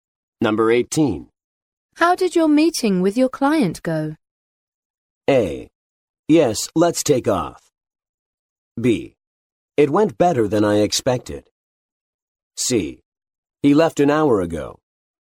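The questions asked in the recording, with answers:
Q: How did your meeting with your client go?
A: B: It went better than I expected.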